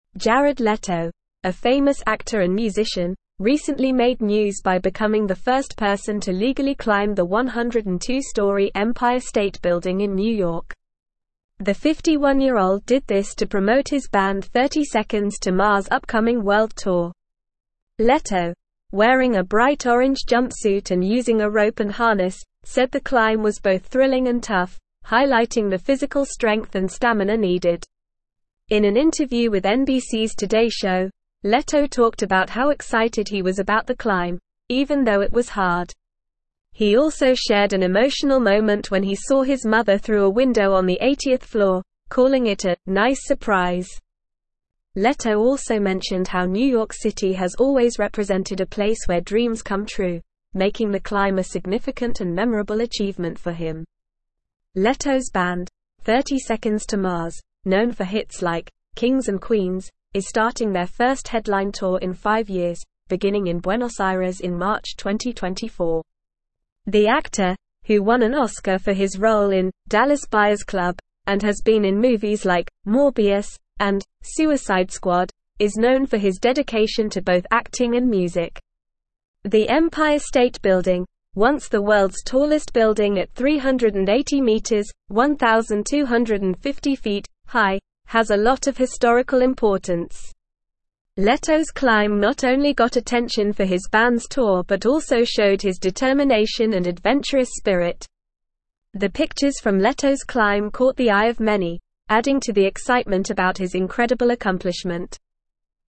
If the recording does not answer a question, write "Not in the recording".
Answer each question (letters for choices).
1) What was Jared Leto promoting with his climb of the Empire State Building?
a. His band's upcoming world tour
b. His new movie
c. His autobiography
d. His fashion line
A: a

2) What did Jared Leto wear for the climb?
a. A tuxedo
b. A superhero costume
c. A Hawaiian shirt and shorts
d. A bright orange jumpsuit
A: d

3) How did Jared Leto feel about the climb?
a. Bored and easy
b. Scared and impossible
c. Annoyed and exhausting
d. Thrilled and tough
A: d

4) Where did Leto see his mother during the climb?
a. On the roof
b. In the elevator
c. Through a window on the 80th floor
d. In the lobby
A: c

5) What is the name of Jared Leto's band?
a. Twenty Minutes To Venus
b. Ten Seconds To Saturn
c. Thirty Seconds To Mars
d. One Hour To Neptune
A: c

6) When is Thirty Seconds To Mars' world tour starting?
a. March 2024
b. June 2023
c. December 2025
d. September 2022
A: a

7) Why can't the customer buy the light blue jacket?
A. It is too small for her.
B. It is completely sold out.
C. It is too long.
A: Not in the recording

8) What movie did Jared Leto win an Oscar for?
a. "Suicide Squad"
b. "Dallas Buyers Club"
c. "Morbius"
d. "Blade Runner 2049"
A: b

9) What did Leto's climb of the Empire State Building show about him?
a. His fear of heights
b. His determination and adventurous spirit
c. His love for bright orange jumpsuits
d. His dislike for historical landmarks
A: b

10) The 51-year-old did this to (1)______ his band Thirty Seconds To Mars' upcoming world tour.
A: promote

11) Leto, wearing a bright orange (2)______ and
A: jumpsuit

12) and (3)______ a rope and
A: using

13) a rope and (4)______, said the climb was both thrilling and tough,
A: harness

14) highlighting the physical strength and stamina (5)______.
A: needed

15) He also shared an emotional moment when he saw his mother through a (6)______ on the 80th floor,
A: window

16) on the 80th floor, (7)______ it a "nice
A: calling

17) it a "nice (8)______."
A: surprise

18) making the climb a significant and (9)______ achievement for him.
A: memorable

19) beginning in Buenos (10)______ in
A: Aires

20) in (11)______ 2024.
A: March

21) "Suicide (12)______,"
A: Squad

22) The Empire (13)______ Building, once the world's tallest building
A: State

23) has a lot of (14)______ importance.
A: historical

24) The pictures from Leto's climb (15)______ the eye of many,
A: caught

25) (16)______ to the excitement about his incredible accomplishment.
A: adding

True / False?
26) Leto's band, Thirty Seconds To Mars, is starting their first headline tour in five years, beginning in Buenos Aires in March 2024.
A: True

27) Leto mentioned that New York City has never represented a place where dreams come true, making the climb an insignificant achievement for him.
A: False

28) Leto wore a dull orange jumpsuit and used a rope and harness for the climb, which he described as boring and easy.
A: False

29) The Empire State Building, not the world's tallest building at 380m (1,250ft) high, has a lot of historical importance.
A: False

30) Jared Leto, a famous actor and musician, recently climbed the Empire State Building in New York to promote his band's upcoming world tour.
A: True

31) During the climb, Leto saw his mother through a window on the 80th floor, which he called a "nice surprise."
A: True

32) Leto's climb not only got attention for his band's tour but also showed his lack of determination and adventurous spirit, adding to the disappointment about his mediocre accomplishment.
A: False

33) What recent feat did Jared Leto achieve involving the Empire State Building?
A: Jared Leto became the first person to legally climb the Empire State Building.

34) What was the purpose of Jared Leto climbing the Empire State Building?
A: He climbed the building to promote his band's upcoming world tour.

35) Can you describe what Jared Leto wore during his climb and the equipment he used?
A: Jared Leto wore a bright orange jumpsuit and used a rope and harness for the climb.

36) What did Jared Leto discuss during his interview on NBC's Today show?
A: During the interview, Leto talked about his excitement for the climb, the difficulty of it, and an emotional moment when he saw his mother.

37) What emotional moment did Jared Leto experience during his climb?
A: He experienced an emotional moment when he saw his mother through a window on the 80th floor.

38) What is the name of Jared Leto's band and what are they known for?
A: His band is named Thirty Seconds To Mars, and they are known for hits like "Kings and Queens."

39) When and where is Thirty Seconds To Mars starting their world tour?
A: They are starting their world tour in Buenos Aires in March 2024.

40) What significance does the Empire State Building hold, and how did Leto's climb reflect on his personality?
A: The Empire State Building is historically significant as it was once the world's tallest building. Leto's climb showed his determination and adventurous spirit.

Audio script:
Jared Leto, a famous actor and musician, recently made news by becoming the first person to legally climb the 102-story Empire State Building in New York. The 51-year-old did this to promote his band Thirty Seconds To Mars' upcoming world tour. Leto, wearing a bright orange jumpsuit and using a rope and harness, said the climb was both thrilling and tough, highlighting the physical strength and stamina needed.
In an interview with NBC's Today show, Leto talked about how excited he was about the climb, even though it was hard. He also shared an emotional moment when he saw his mother through a window on the 80th floor, calling it a "nice surprise." Leto also mentioned how New York City has always represented a place where dreams come true, making the climb a significant and memorable achievement for him.
Leto's band, Thirty Seconds To Mars, known for hits like "Kings and Queens," is starting their first headline tour in five years, beginning in Buenos Aires in March 2024. The actor, who won an Oscar for his role in "Dallas Buyers Club" and has been in movies like "Morbius" and "Suicide Squad," is known for his dedication to both acting and music.
The Empire State Building, once the world's tallest building at 380m (1,250ft) high, has a lot of historical importance. Leto's climb not only got attention for his band's tour but also showed his determination and adventurous spirit. The pictures from Leto's climb caught the eye of many, adding to the excitement about his incredible accomplishment.

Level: Level 3